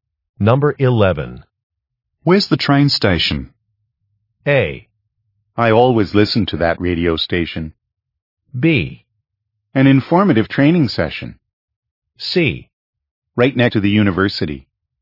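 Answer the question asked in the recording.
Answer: C: Right next to the university.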